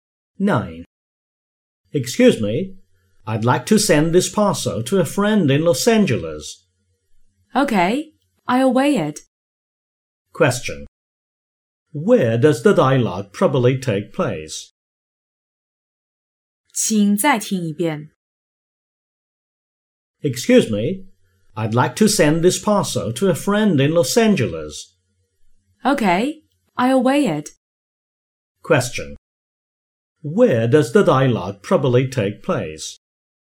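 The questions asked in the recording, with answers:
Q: Where does the dialogue probably take place?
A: At a post office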